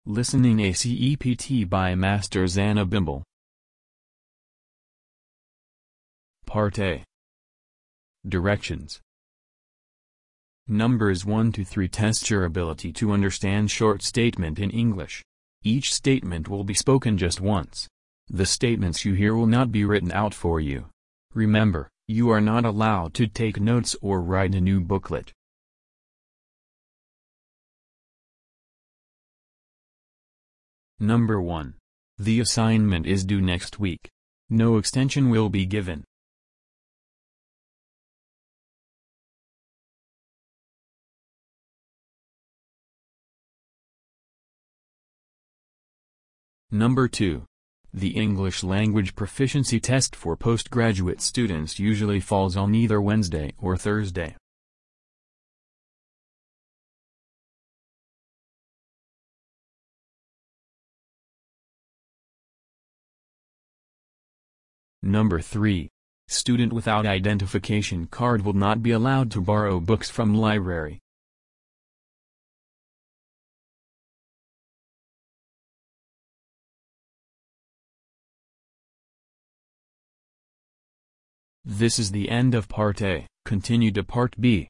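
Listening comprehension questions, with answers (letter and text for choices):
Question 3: Question 3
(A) To borrow book from the library, student need to bring their identification card with them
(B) Identification card can not be used to borrow books from library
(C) The librarian needs to borrow the student identification card to pay for the books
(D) Scholarship student needs identification card to return their allowance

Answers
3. (A) To borrow book from the library, student need to bring their identification card with them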